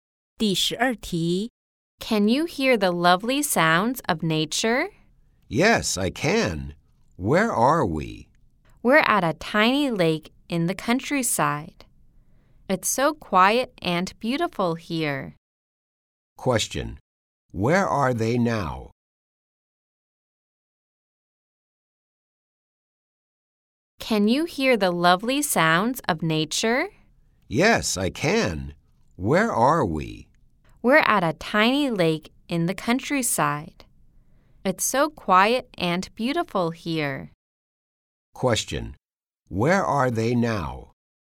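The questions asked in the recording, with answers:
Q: Question. Where are they now?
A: At a tiny lake in the countryside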